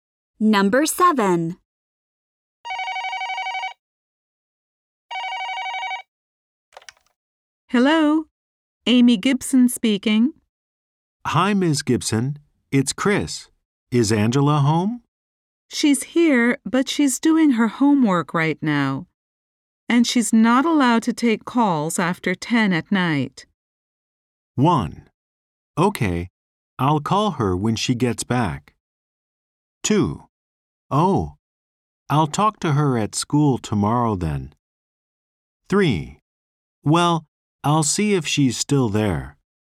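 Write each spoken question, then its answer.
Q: And she's not allowed to take calls after 10 at night.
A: 2: Oh, I'll talk to her at school tomorrow then.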